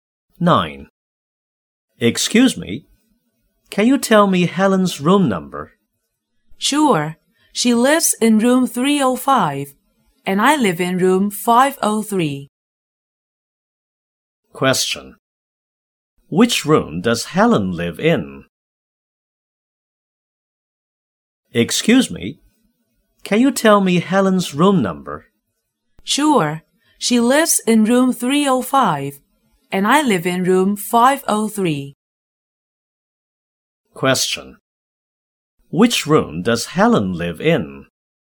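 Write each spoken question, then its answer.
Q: Which room does Helen live in?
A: Room 305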